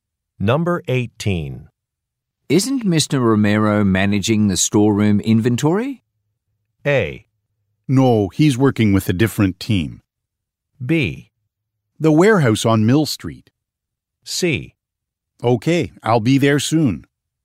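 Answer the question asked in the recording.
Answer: A: No, he's working with a different team.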